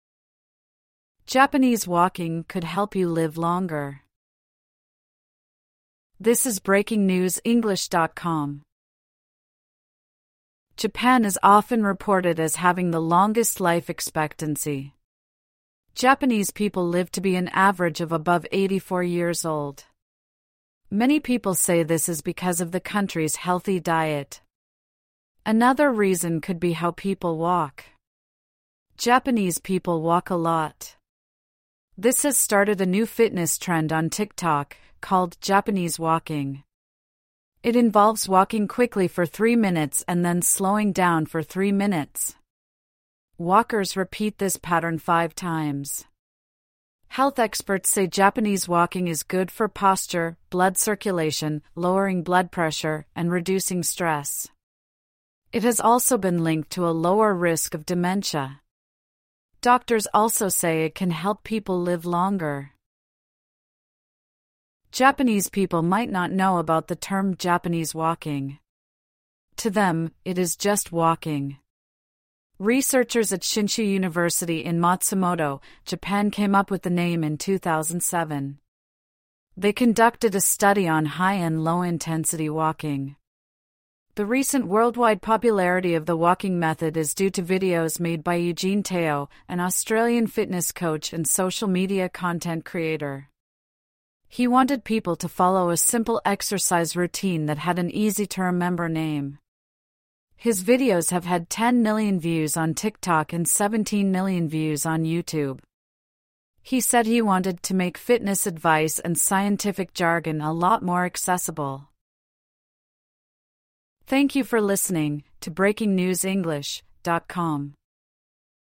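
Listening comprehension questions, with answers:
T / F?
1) Japanese walking means walking quickly for 10 minutes non-stop.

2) Health experts say Japanese walking is good for blood pressure.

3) Japanese people might not know the term "Japanese walking".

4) The term "Japanese Walking" is over 200 years old.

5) A "Japanese Walking" video has been viewed 10 million times on TikTok.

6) A fitness coach wants exercise to be full of scientific jargon.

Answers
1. F
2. T
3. T
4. F
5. T
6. F

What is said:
'Japanese walking' could help you live longer
Japan is often reported as having the longest life expectancy. Japanese people live to be an average of above 84 years old. Many people say this is because of the country's healthy diet. Another reason could be how people walk. Japanese people walk a lot. This has started a new fitness trend on TikTok, called "Japanese Walking". It involves walking quickly for three minutes and then slowing down for three minutes. 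Walkers repeat this pattern five times. Health experts say Japanese walking is good for posture, blood circulation, lowering blood pressure, and reducing stress. It has also been linked to a lower risk of dementia. Doctors also say it can help people live longer.
Japanese people might not know about the term "Japanese Walking". To them, it is just walking. Researchers at Shinshu University in Matsumoto, Japan came up with the name in 2007. They conducted a study on high- and low-intensity walking. The recent worldwide popularity of the walking method is due to videos made by Eugene Teo, an Australian fitness coach and social media content creator. He wanted people to follow a simple exercise routine that had an easy-to-remember name. His videos have had 10 million views on TikTok and 17 million views on YouTube. He said he wanted "to make fitness advice and scientific jargon a lot more accessible".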